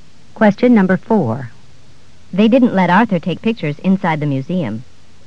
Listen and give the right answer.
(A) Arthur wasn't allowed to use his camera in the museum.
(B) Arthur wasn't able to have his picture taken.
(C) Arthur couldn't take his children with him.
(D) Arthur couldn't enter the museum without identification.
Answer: (A) Arthur wasn't allowed to use his camera in the museum.

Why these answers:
They didn't let Arthur take pictures inside the museum.